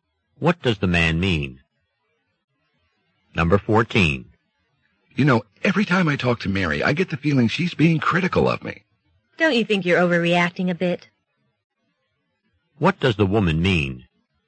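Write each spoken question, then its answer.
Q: What does the woman mean?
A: Mary probably isn't being critical; the man is overreacting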